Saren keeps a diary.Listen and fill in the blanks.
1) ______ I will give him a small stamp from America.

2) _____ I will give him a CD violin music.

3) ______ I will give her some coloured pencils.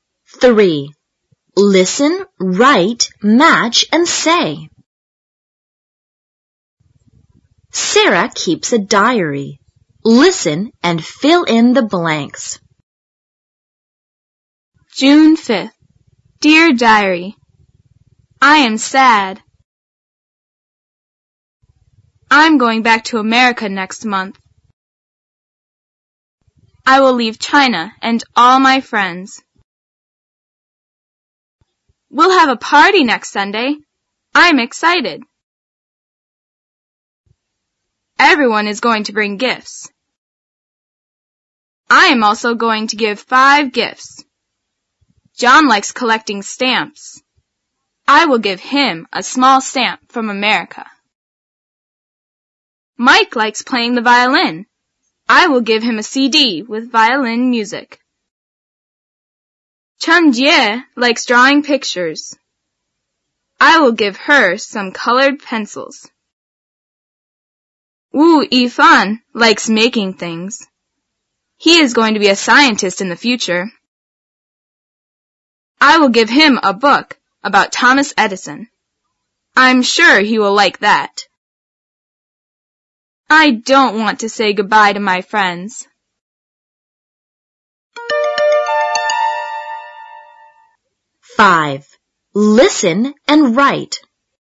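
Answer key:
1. John likes collecting stamps.
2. Mike likes playing the violin.
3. Chen Jie likes drawing pictures.

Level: 小学英语六年级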